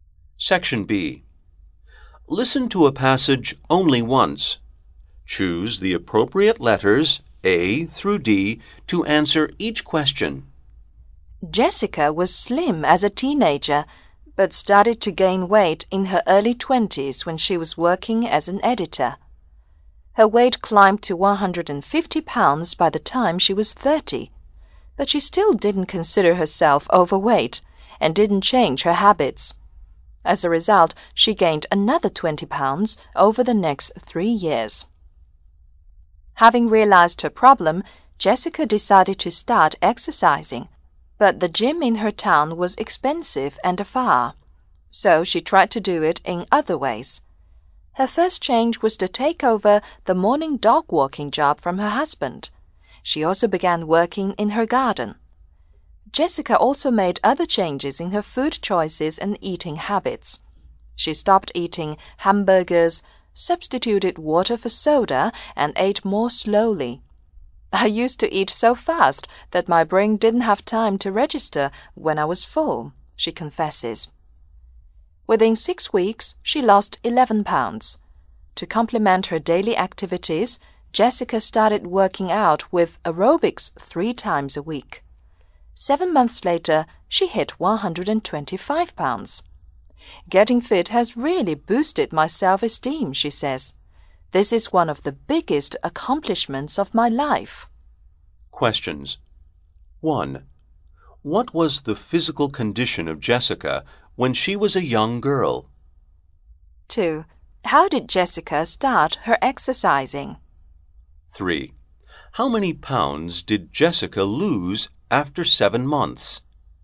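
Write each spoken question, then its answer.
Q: What was the physical condition of Jessica when she was a young girl?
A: She was slim

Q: How did Jessica start her exercising?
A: By walking the dog in the morning

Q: How many pounds did Jessica lose after 7 months?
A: 45 pounds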